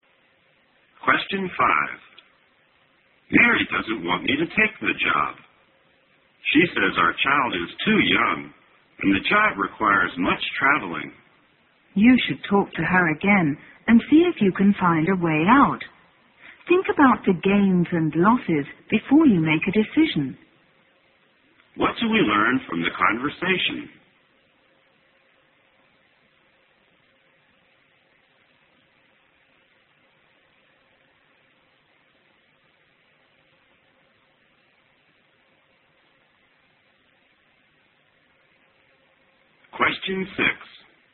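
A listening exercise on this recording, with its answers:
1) What do we learn from the conversation?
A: The man is thinking about taking a new job.

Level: 大学英语四级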